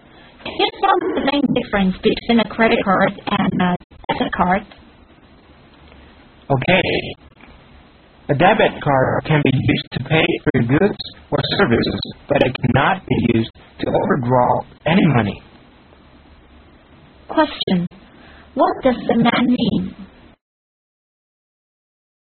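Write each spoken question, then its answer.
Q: What does the man mean?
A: A debit card can pay for goods or services but cannot be used to overdraw money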